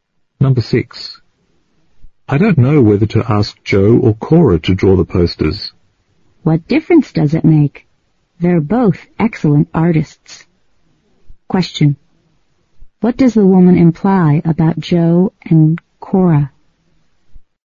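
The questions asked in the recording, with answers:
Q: What does the woman imply about Joe and Cora?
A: Either one would do a good job on the posters, because they are both excellent artists.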